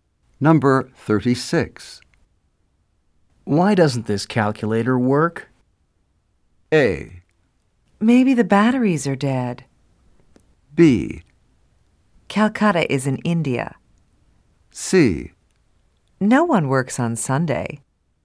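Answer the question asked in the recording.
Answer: A: Maybe the batteries are dead.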